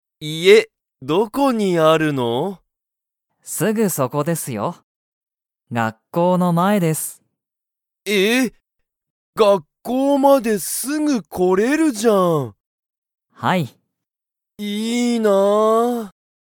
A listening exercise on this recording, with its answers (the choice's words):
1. ナオキの家いえは__だ。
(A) お店みせのとこ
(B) ちょっと後あと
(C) ここ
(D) 学校がっこうの前まえ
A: 学校がっこうの前まえ

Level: Level 1